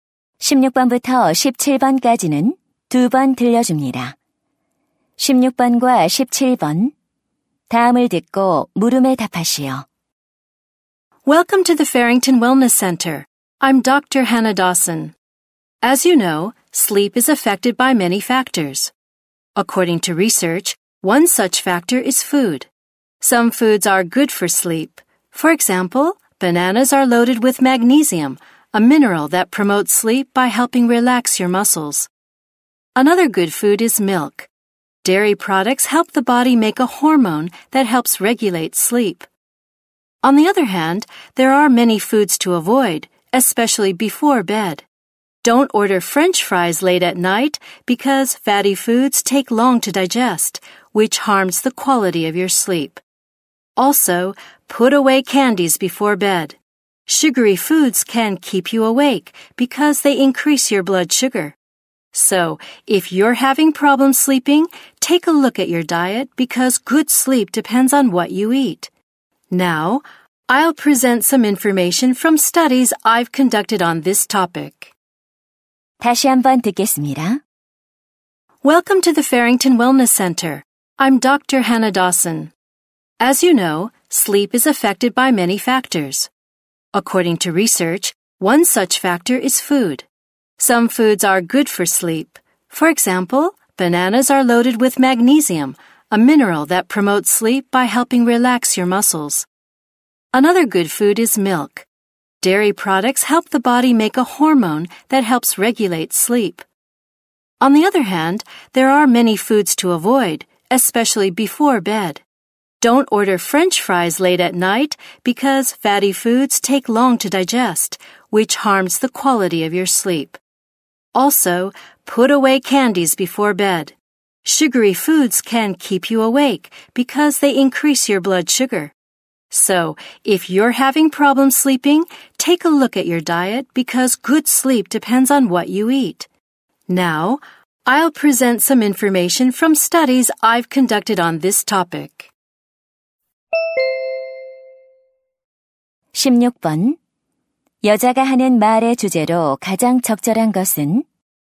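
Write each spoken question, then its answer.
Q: 여자가 하는 말의 주제로 가장 적절한 것은?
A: 수면에 영향을 주는 음식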